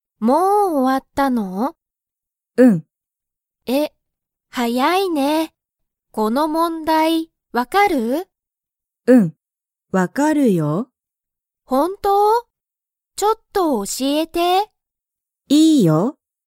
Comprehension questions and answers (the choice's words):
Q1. ちひろは、さおりに教(おし)えますか?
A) はい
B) いいえ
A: はい

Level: Level 1